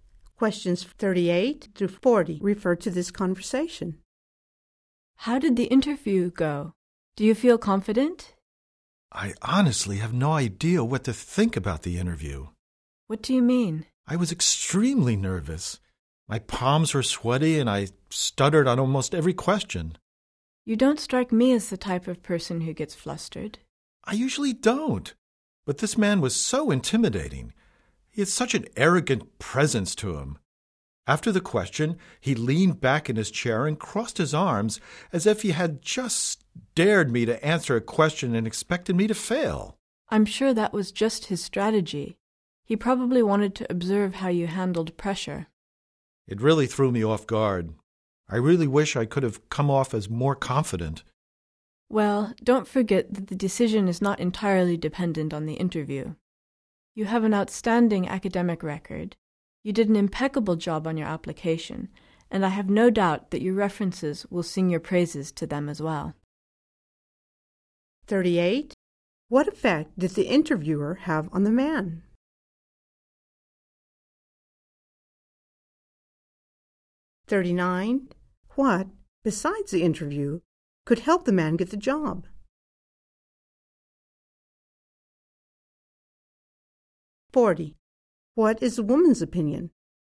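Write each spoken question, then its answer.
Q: What effect did the interviewer have on the man?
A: He made him nervous and flustered

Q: What, besides the interview, could help the man get the job?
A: His academic record, application and references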